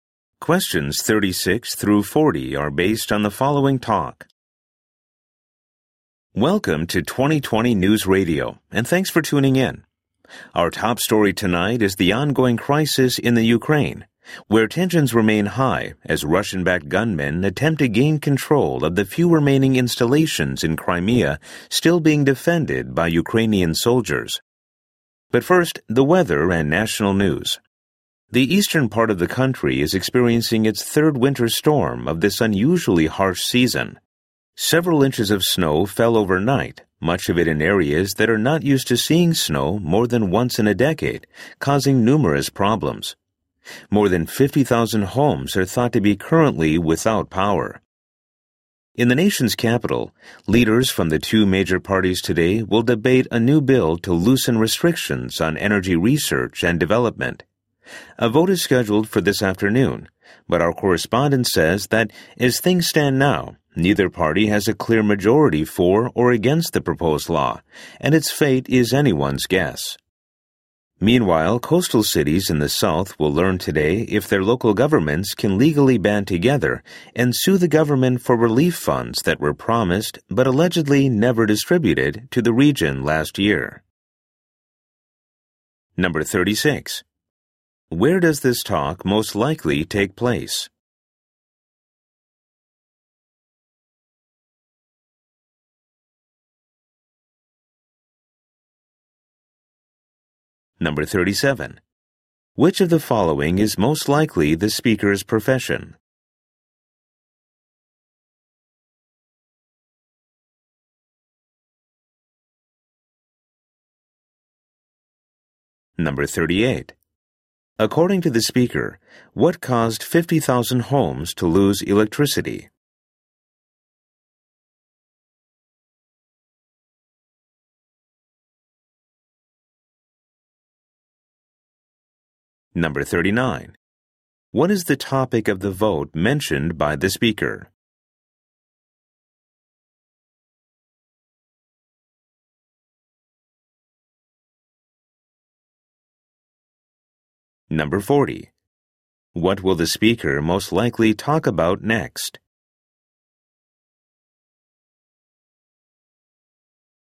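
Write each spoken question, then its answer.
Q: Where does this talk most likely take place?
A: On a radio news program

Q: Which of the following is most likely the speaker's profession?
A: News announcer

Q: According to the speaker, what caused 50,000 homes to lose electricity?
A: A winter snowstorm

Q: What is the topic of the vote mentioned by the speaker?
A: A bill to loosen restrictions on energy research and development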